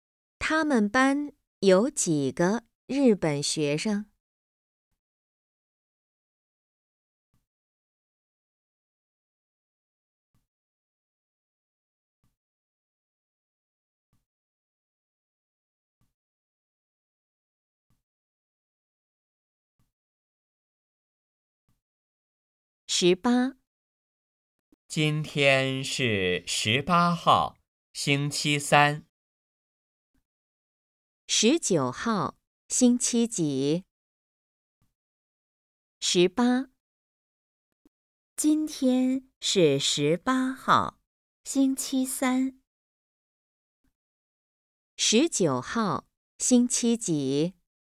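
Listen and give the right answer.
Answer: 星期四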